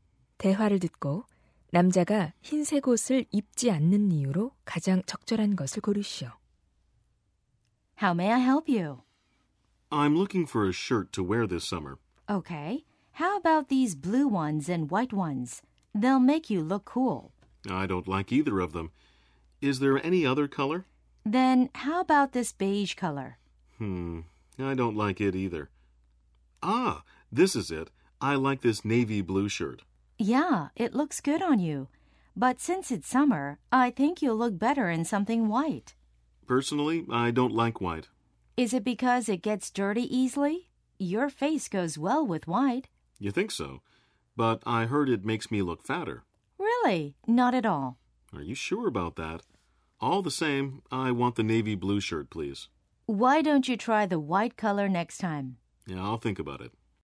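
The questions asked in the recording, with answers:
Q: 대화를 듣고 남자가 흰색 옷을 입지 않는 이유로 가장 적절한 것을 고르시오.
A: 흰색 옷을 입으면 더 뚱뚱해 보인다고 들어서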